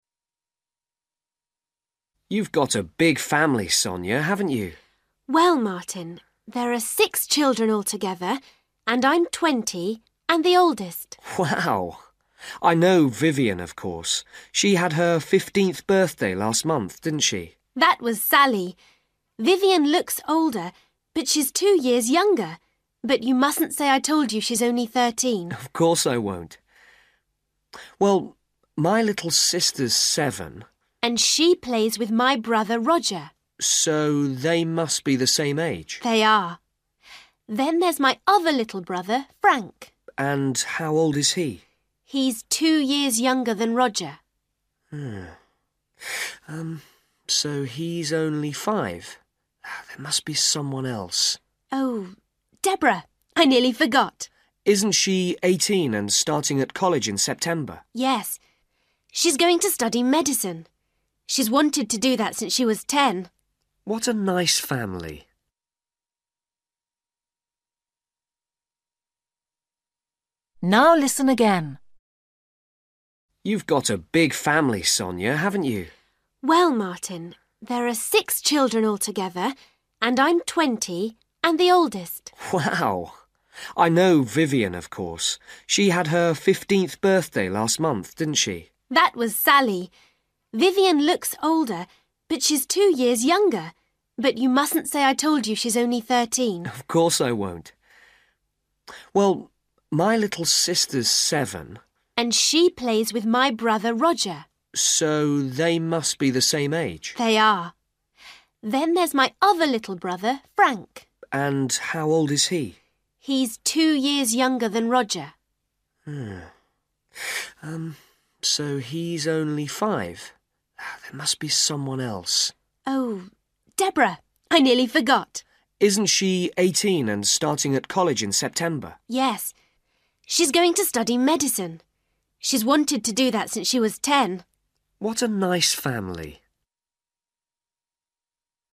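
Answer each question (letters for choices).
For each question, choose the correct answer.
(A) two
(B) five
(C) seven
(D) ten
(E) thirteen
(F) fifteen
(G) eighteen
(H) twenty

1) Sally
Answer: F

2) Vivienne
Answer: E

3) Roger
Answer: C

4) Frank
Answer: B

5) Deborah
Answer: G

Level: Luyện nghe trình độ A2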